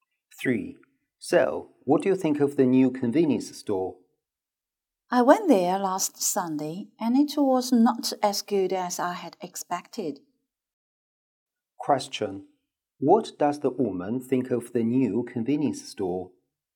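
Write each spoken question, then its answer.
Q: What does the woman think of the new convenience store?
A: It was not as good as she had expected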